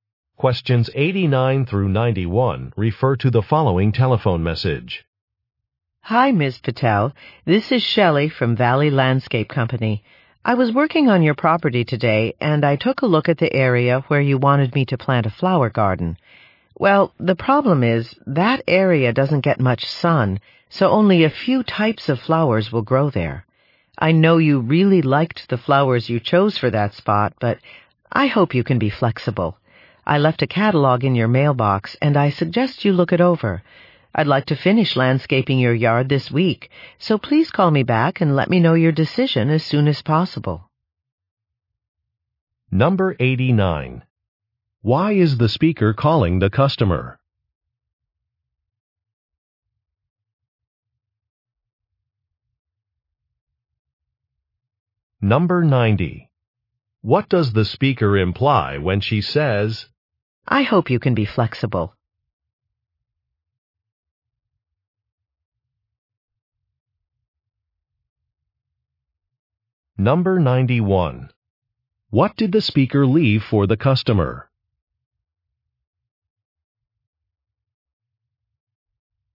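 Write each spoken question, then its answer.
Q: What did the speaker leave for the customer?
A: A catalog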